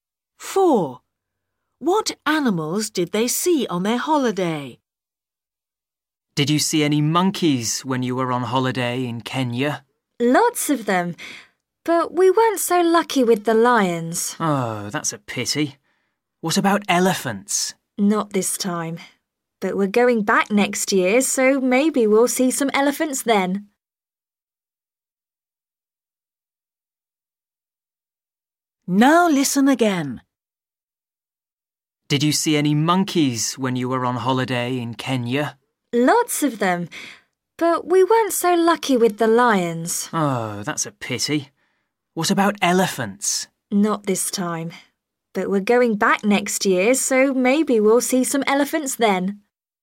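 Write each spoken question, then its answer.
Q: What animals did they see on their holiday?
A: monkeys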